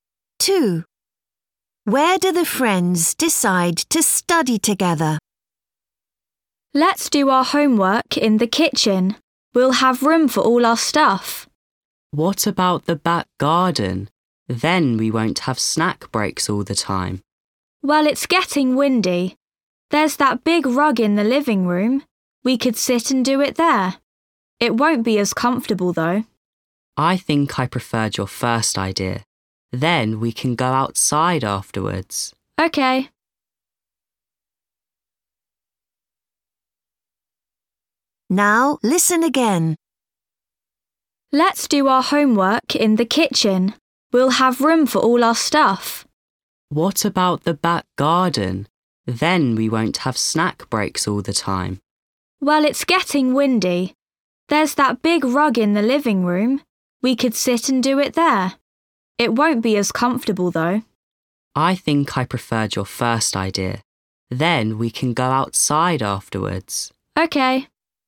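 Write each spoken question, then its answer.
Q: Where do the friends decide to study together?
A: In the kitchen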